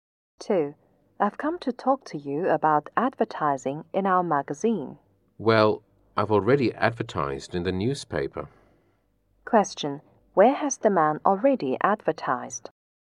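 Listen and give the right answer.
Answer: In the newspaper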